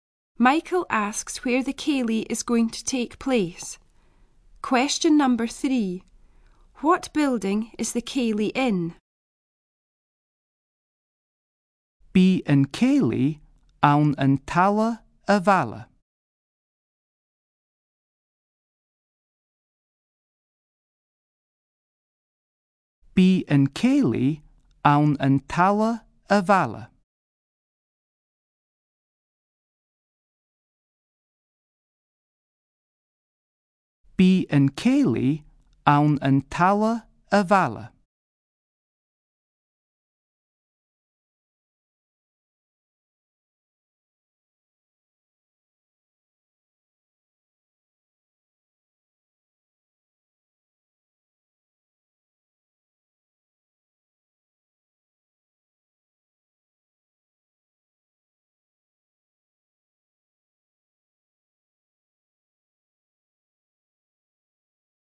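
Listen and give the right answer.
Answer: The town hall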